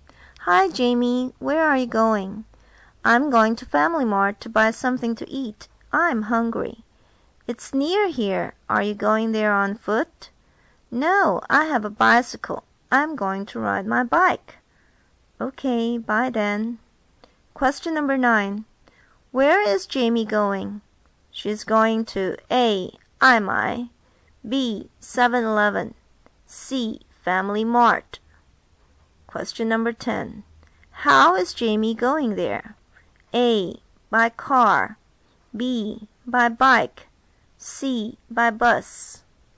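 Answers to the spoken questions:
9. C: Family Mart
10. B: By bike.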